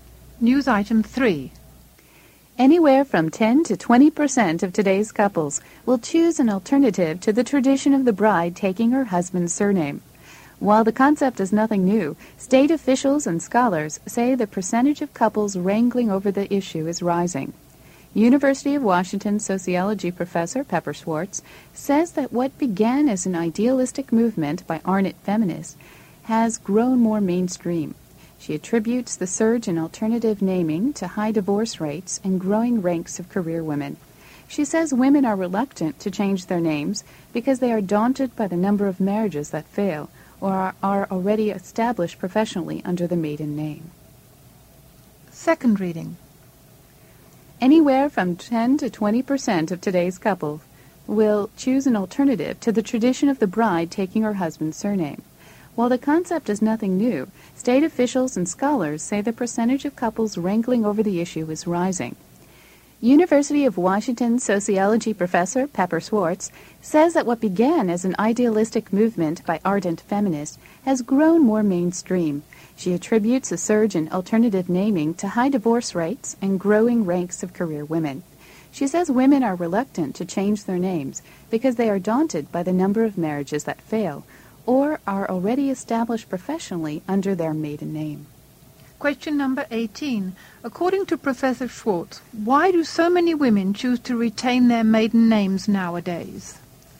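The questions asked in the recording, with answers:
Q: According to Professor Schwartz, why do so many women choose to retain their maiden names nowadays?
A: Because so many marriages fail, and because many are already established professionally under their maiden names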